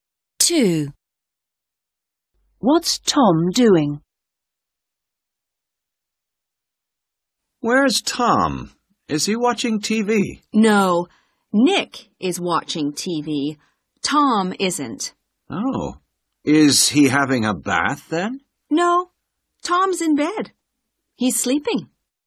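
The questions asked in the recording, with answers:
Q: What's Tom doing?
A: He's sleeping in bed.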